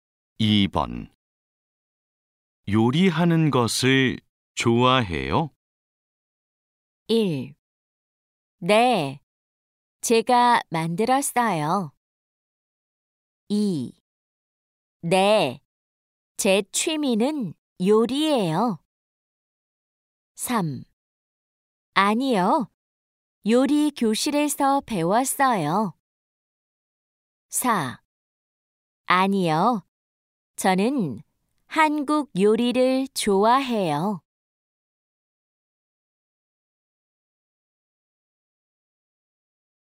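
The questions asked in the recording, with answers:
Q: 요리하는 것을 좋아해요?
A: 2: 네, 제 취미는 요리예요.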